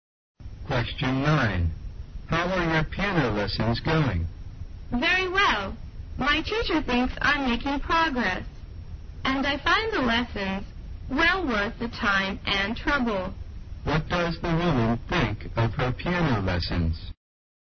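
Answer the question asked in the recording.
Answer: They are well worth the time and trouble.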